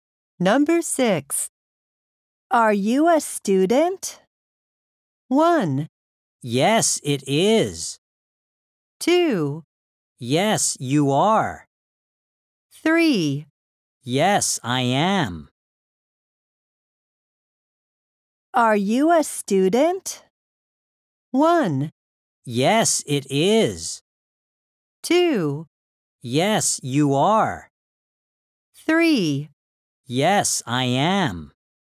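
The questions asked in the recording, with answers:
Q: Are you a student?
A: 3: Yes, I am.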